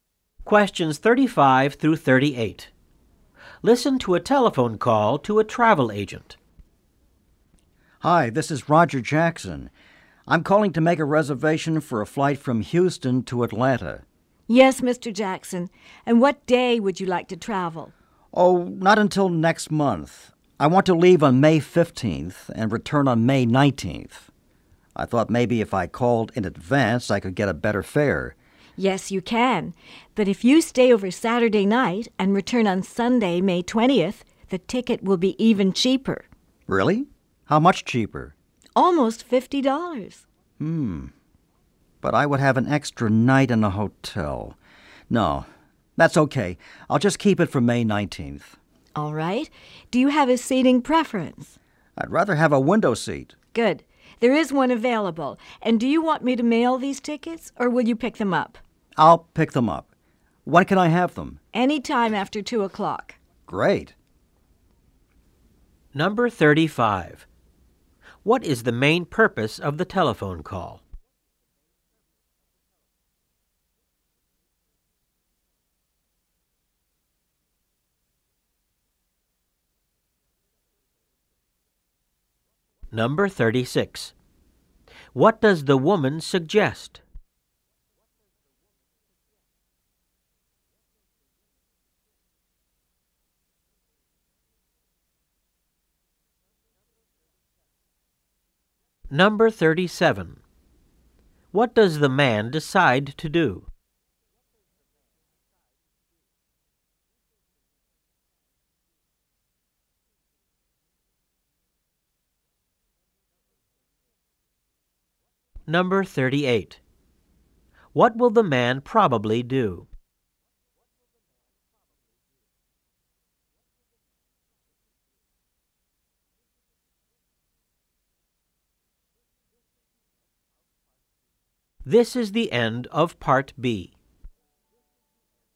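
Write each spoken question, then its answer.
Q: What is the main purpose of the telephone call?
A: To make a flight reservation from Houston to Atlanta

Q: What does the woman suggest?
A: Staying over Saturday night and returning Sunday, May 20th, for a cheaper ticket

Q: What does the man decide to do?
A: Keep his return on May 19th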